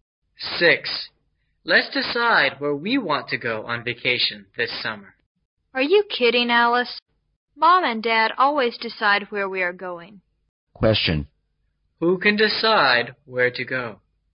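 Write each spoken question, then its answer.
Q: Who can decide where to go?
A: Mom and Dad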